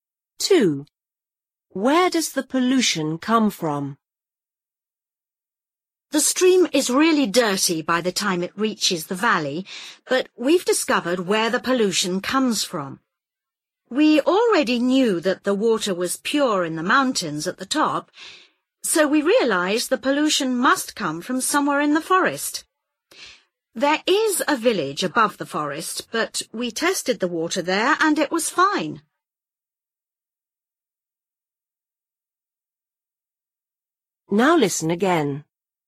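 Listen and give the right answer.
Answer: Somewhere in the forest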